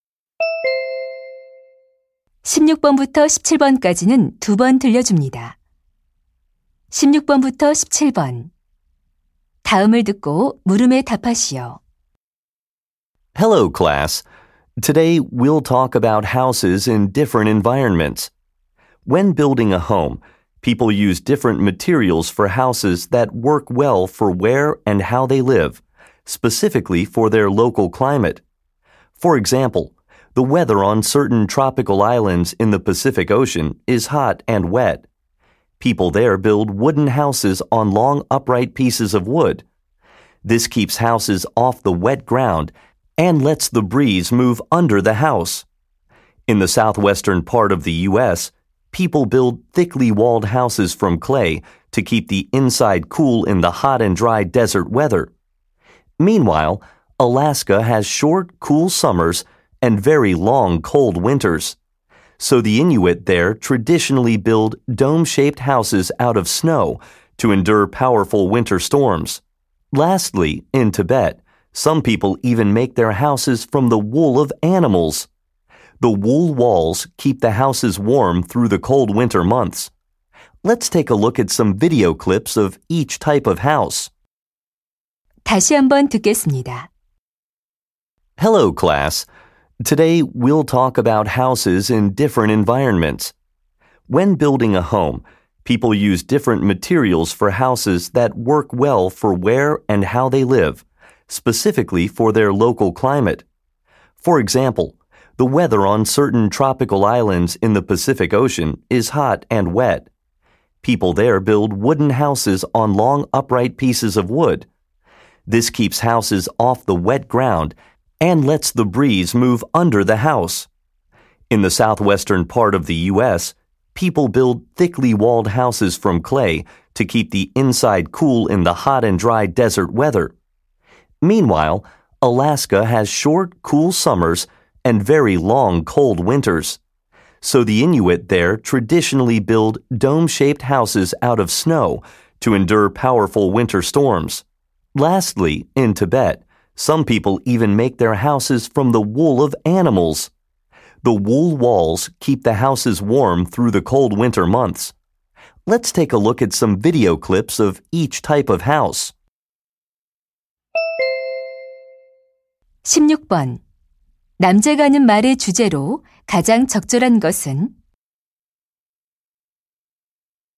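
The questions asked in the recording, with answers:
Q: 남자가 하는 말의 주제로 가장 적절한 것은?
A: 기후에 따라 다른 재료로 지은 집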